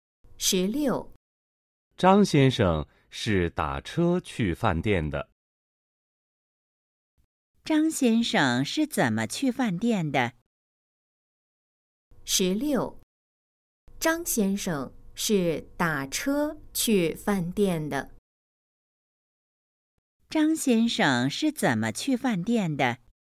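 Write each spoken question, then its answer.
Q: 张先生是怎么去饭店的?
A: 打车去的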